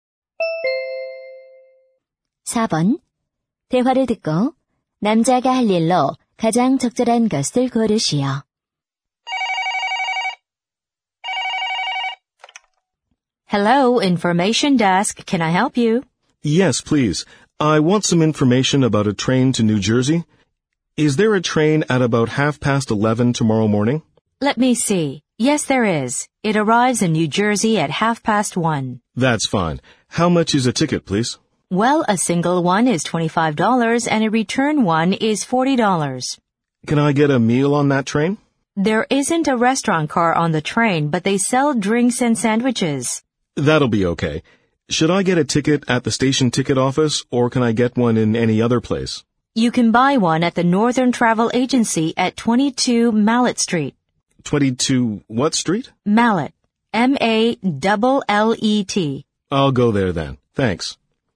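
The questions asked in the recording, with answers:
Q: 대화를 듣고 남자가 할 일로 가장 적절한 것을 고르시오.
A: 여행사에 가서 기차표 구입하기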